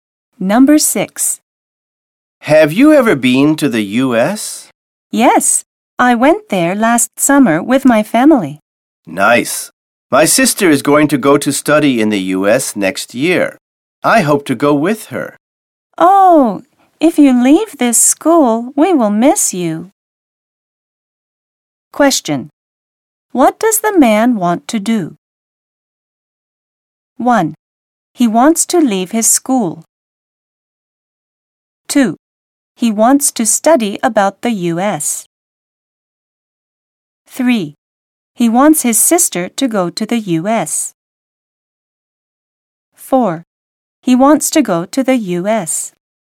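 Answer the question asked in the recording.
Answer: 4: He wants to go to the U.S.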